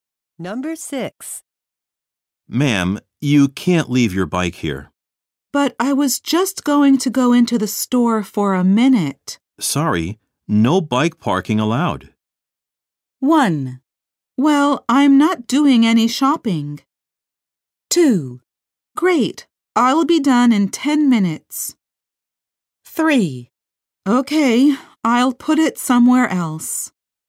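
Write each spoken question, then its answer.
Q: Sorry, no bike parking allowed.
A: 3: Okay, I'll put it somewhere else.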